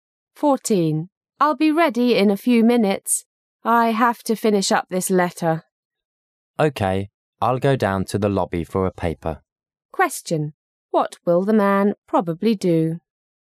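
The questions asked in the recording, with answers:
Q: What will the man probably do?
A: Go down to the lobby to get a newspaper.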